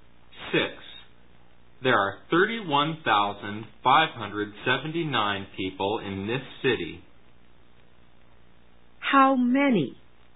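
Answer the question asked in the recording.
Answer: 31,579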